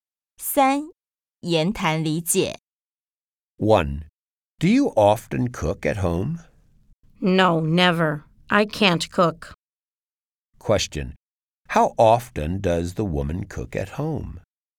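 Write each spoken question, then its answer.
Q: How often does the woman cook at home?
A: Never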